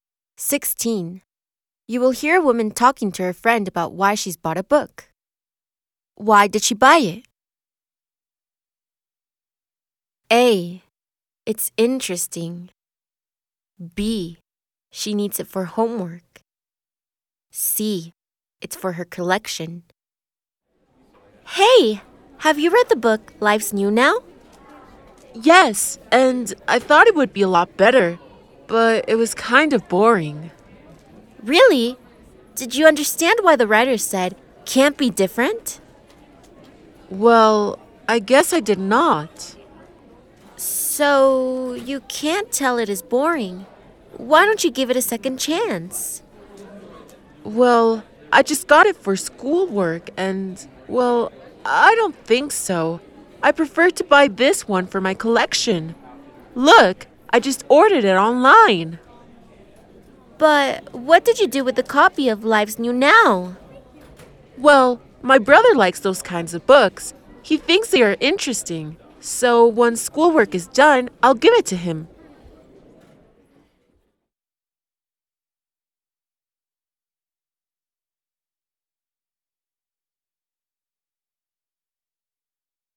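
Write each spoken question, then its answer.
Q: Why did she buy it? A. It's interesting.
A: C: It's for her collection.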